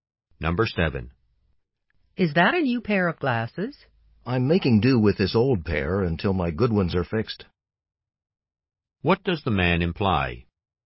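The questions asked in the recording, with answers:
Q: What does the man imply?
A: These are old glasses; his good ones are being fixed.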